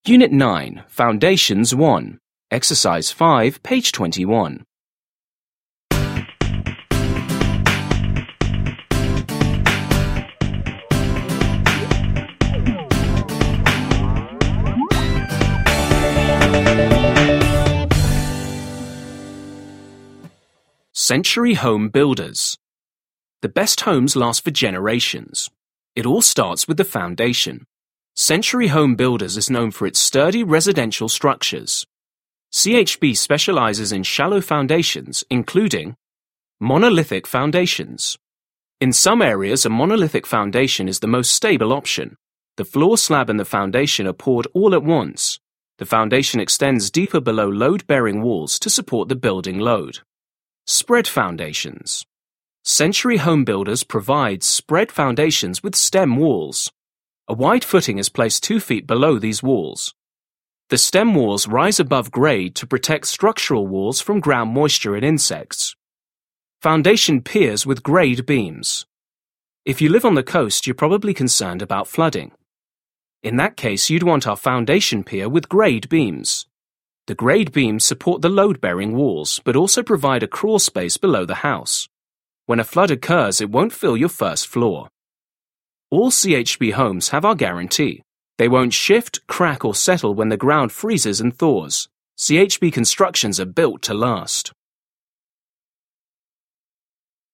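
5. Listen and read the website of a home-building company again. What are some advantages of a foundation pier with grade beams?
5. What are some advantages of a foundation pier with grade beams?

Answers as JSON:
{"5": "It supports the load-bearing walls and gives a crawl space below the house, so a flood won't fill the first floor."}

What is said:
Unit 9. Foundations 1.
CENTURY Home Builders
The best homes last for generations. It all starts with the foundation Century Home Builders is known for its sturdy residential structures. CHB specializes in shallow foundations, including:
Monolithic foundations
In some areas, a monolithic foundation is the most stable option. The floor slab and the foundation are poured all at once. The foundation extends deeper below load bearing walls to support the building load.
Spread foundations
Century Home Builders provides spread foundations with stem walls. 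A wide footing is placed two feet below these walls. The stem walls rise above grade to protect structural walls from ground moisture and insects.
Foundation piers with grade beams
If you live on the coast, you're probably concerned about flooding. In that case, you'd want our foundation pier with grade beams. The grade beams support the load bearing walls, but also provide a crawl space below the house. When a flood occurs, it won't fill your first floor!
All CHB homes have our guarantee - they won't shift, crack or settle when the ground freezes and thaws. CHB constructions are built to last!
Residential Monolithic foundation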